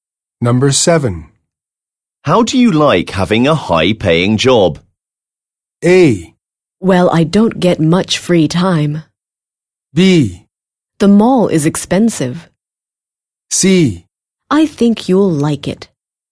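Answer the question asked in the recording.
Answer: A: Well, I don't get much free time.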